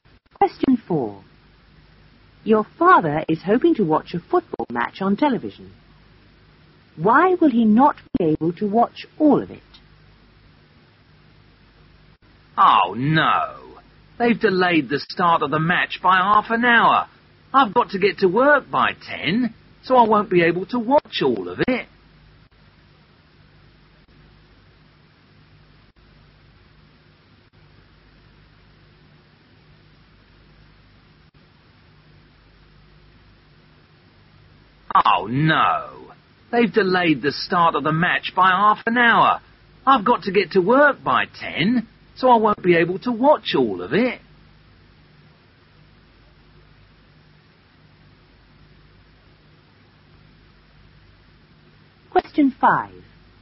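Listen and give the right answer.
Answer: The start was delayed by half an hour and he has to be at work by 10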